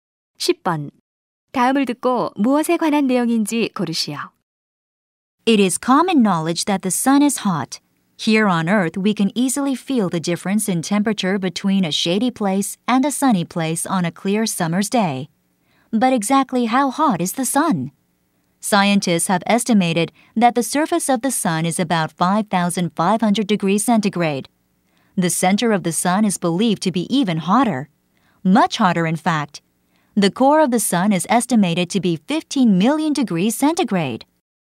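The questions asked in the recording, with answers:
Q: 다음을 듣고 무엇에 관한 내용인지 고르시오.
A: 태양의 온도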